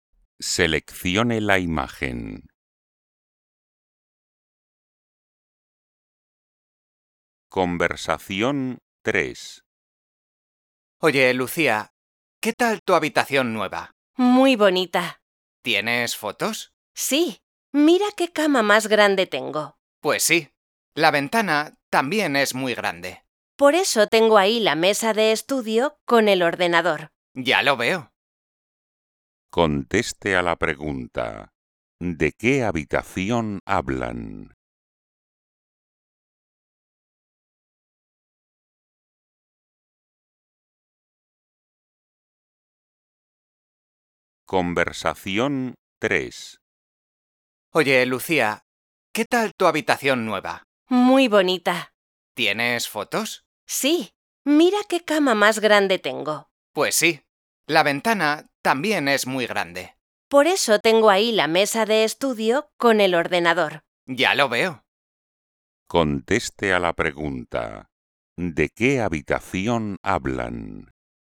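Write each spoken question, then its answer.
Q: ¿de qué habitación hablan?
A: El dormitorio de Lucía, con una cama grande, una ventana grande y la mesa de estudio con el ordenador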